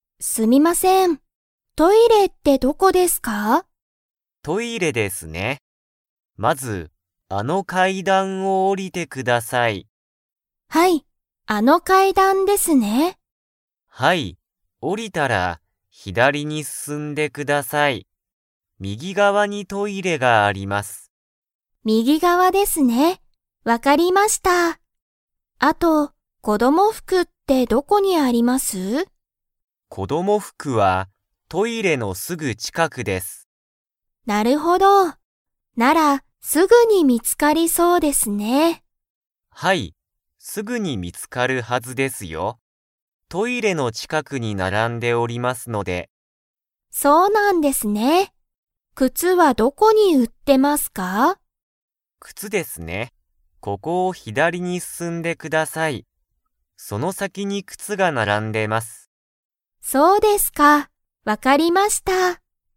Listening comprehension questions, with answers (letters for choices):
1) トイレに行いくためには、まず階段かいだんを 。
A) 上のぼる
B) 下おりる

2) トイレのすぐ近ちかくには、何なにが売うられていますか?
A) 靴くつ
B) バッグ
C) 子供服こどもふく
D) 大人おとなの服ふく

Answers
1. B
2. C

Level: Level 4